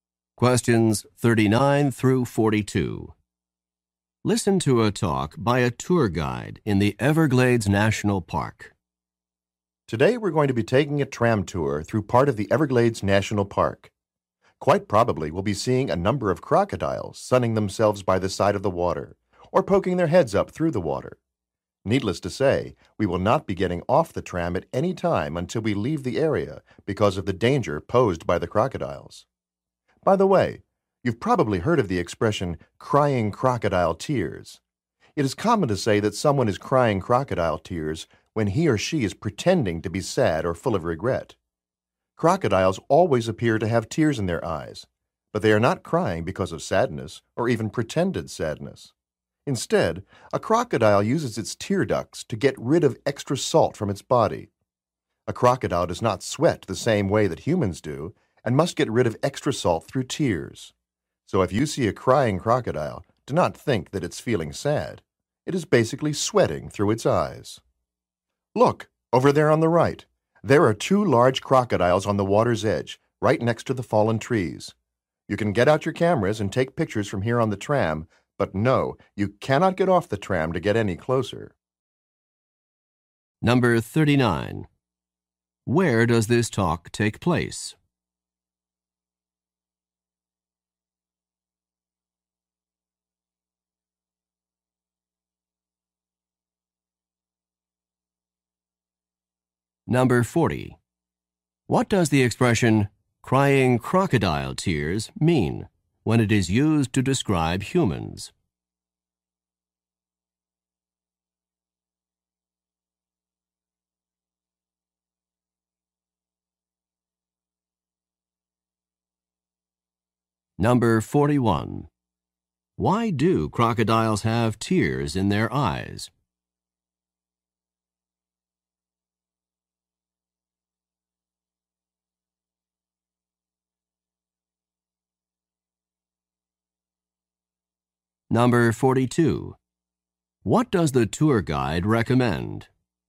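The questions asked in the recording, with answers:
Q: Where does this talk take place?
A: On a tram tour in the Everglades National Park

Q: Why do crocodiles have tears in their eyes?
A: To get rid of extra salt from their bodies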